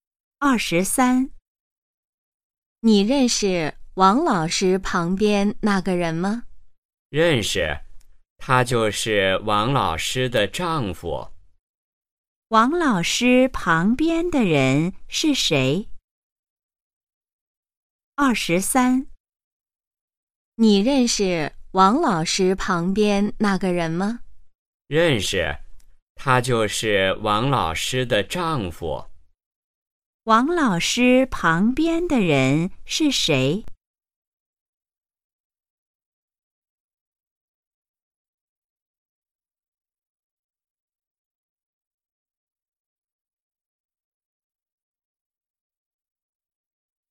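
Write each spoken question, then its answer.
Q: 王老师旁边的人是谁?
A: 王老师的丈夫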